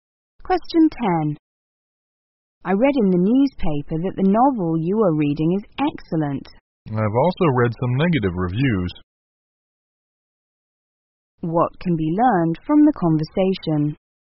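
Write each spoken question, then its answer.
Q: What can be learned from the conversation?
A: Opinions about the novel differ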